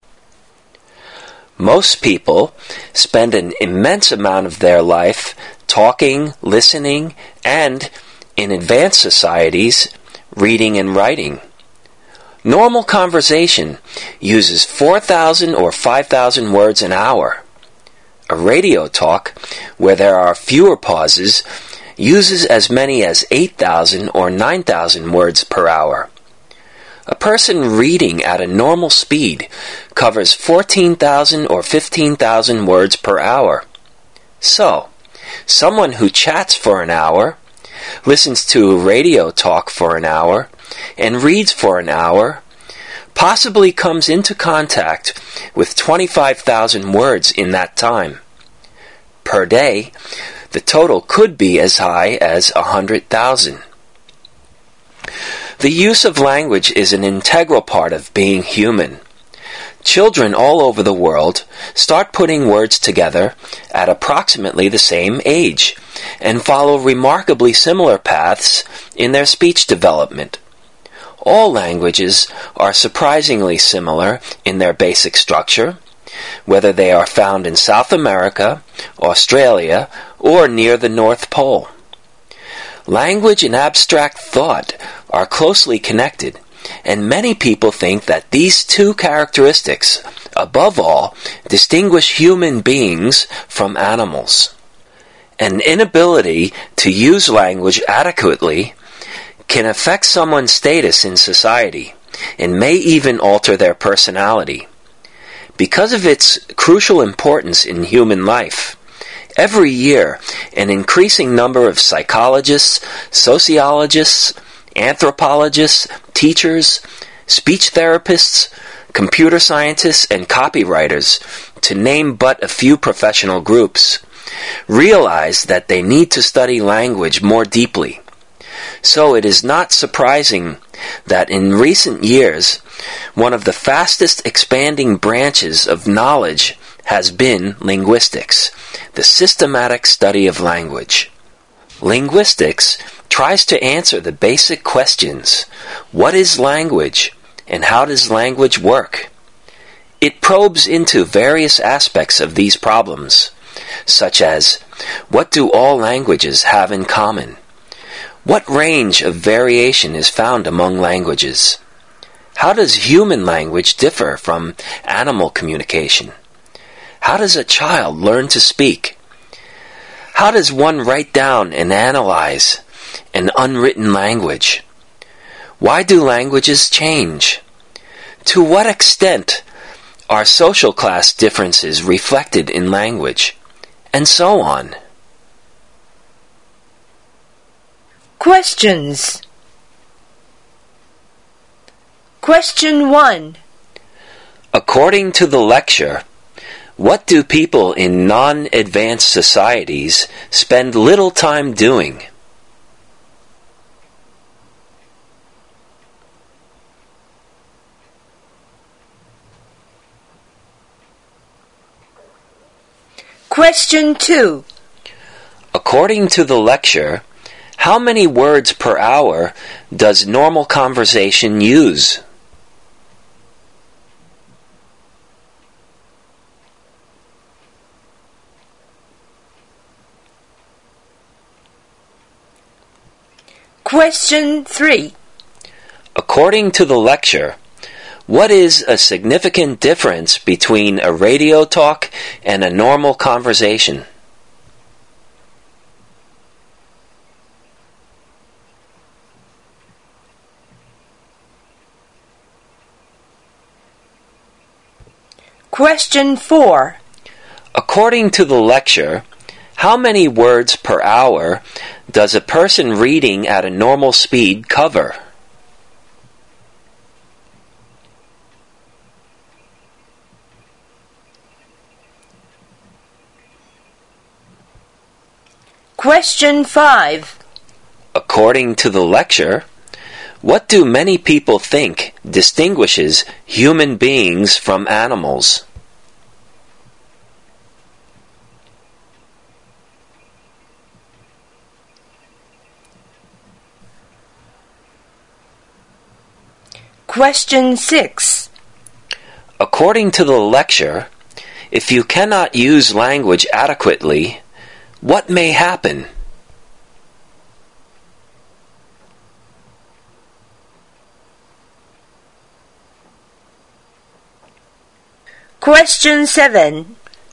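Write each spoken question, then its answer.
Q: According to the lecture, what do people in non-advanced societies spend little time doing?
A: Reading and writing

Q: According to the lecture, how many words per hour does normal conversation use?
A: 4,000 or 5,000 words

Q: According to the lecture, what is a significant difference between a radio talk and a normal conversation?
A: A radio talk has fewer pauses, so it uses more words per hour

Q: According to the lecture, how many words per hour does a person reading at a normal speed cover?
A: 14,000 or 15,000 words

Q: According to the lecture, what do many people think distinguishes human beings from animals?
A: Language and abstract thought

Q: According to the lecture, if you cannot use language adequately, what may happen?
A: It can affect your status in society and may even alter your personality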